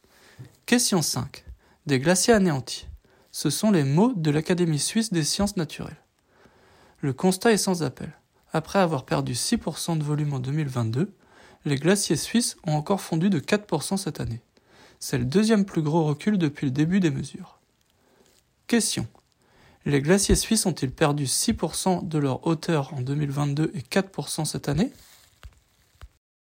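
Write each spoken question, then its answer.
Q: Les glaciers suisses ont-ils perdu 6% de leur hauteur en 2022 et 4% cette année?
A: Non, de leur volume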